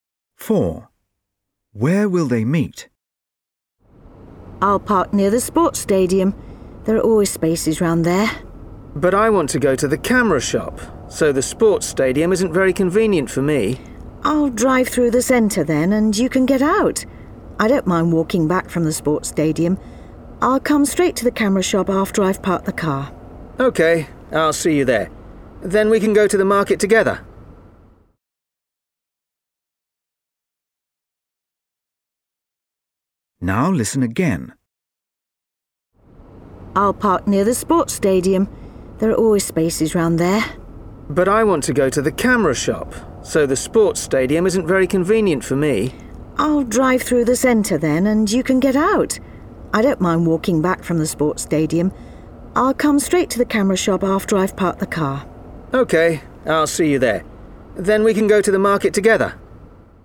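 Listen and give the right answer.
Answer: At the camera shop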